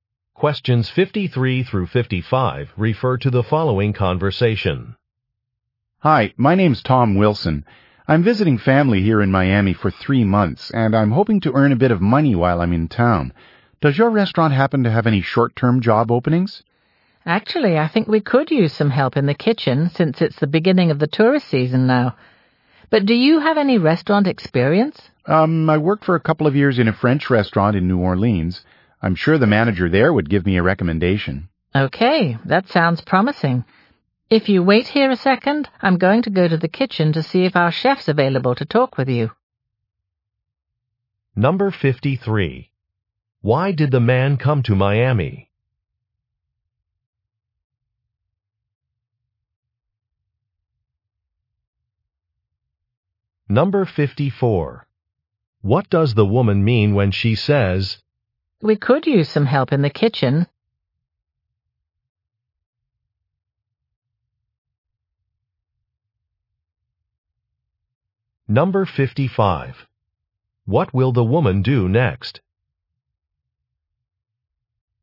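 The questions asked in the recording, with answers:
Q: Why did the man come to Miami?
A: To visit family

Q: What will the woman do next?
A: Check whether the chef is available to talk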